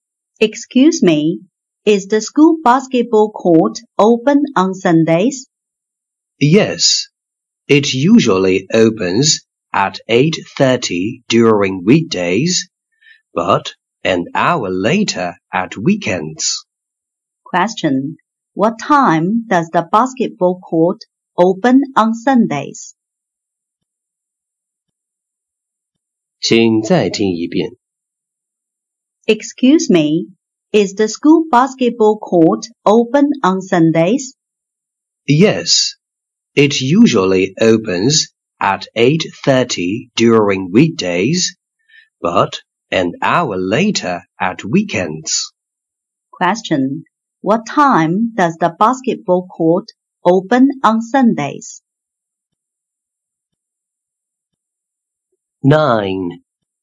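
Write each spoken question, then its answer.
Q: what time does the basketball court open on Sundays?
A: At 9:30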